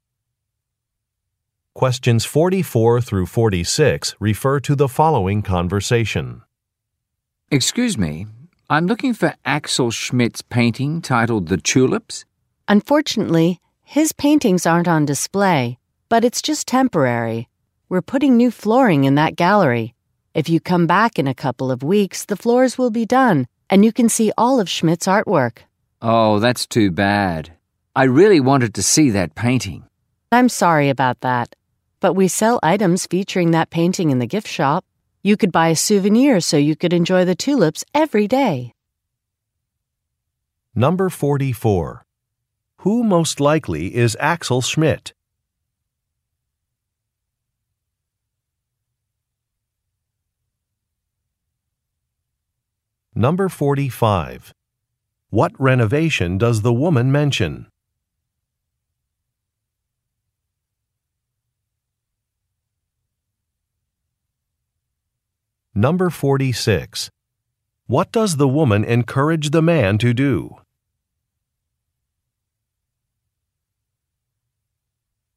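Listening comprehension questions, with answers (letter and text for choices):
Question 44 - 46 refer to following conversation:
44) Who most likely is Axel Schmidt?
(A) A store manager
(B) A construction worker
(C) A journalist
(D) An artist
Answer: (D) An artist

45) What renovation does the woman mention?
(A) Some walls are being painted.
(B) Some floors are being replaced.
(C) Some windows are being installed.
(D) Some light fixtures are being repaired.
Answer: (B) Some floors are being replaced.

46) What does the woman encourage the man to do?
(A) Visit a gift shop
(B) Send a package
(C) Wait for a bus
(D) Take a photograph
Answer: (A) Visit a gift shop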